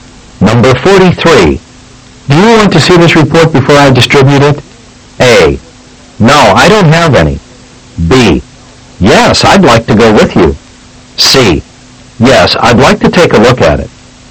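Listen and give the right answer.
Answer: C: Yes, I'd like to take a look at it.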